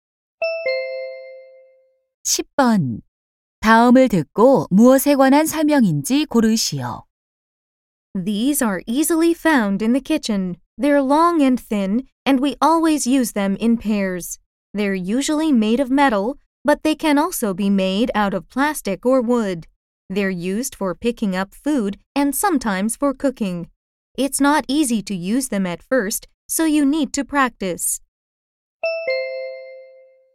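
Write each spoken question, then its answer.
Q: 다음을 듣고 무엇에 관한 설명인지 고르시오.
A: 젓가락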